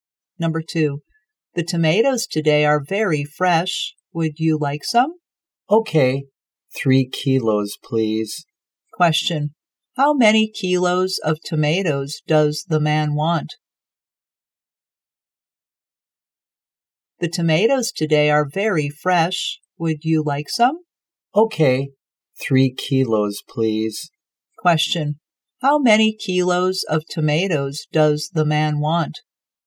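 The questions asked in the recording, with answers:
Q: how many kilos of tomatoes does the man want?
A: 3 kilos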